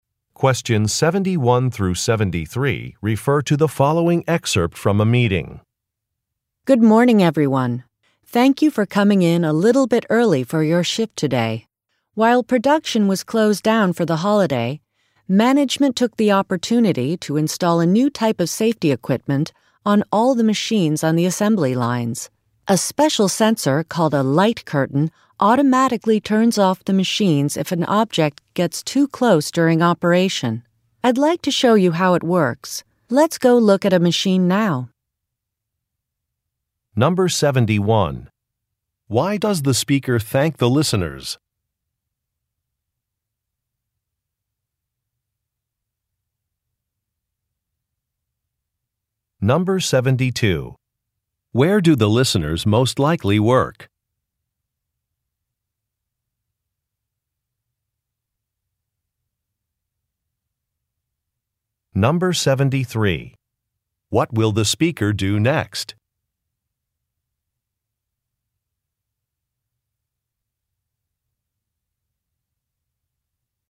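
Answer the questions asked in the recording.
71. For coming in early for their shift
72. At a factory (assembly lines)
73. Show how the new safety equipment works on a machine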